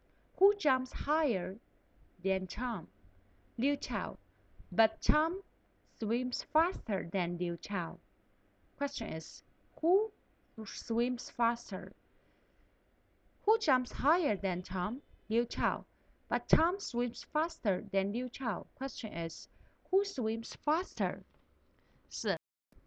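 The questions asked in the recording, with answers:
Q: who swims faster?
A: Tom.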